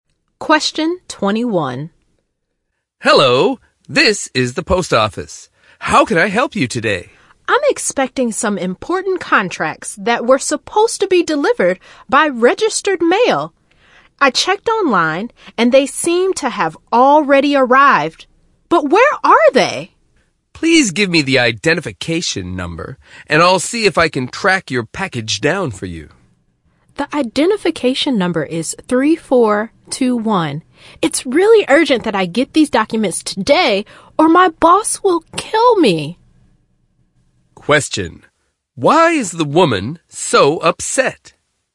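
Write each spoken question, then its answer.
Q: Why is the woman so upset?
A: Her important contracts sent by registered mail are missing, and she needs them today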